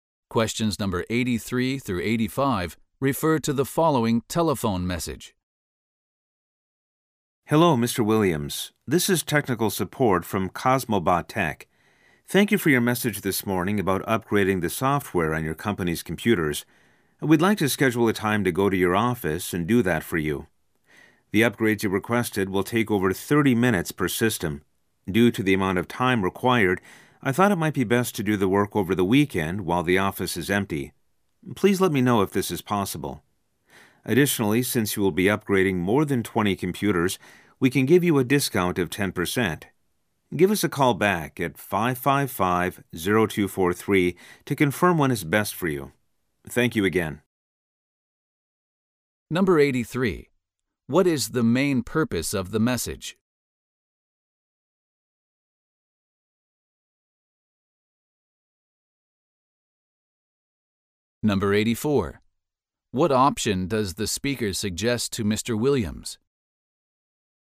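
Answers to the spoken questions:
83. To schedule a software upgrade on the company's computers
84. Doing the work over the weekend
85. A 10% discount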